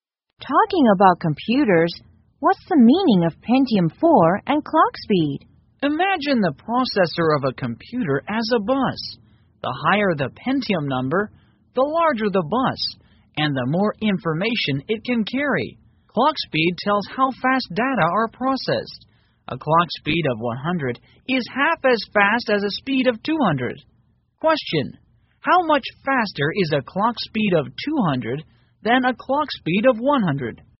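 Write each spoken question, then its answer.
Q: how much faster is a clock speed of 200 than a clock speed of 100?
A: twice as fast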